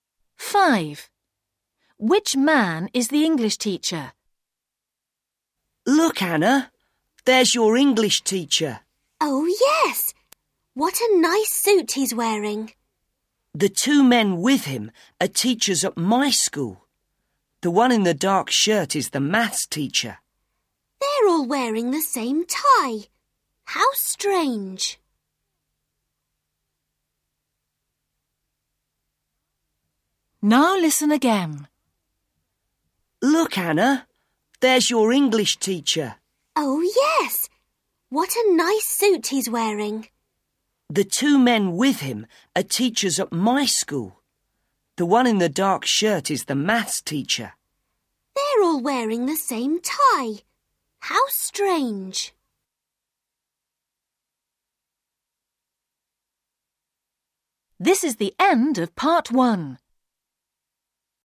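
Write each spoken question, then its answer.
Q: Which man is the English teacher?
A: The man wearing a suit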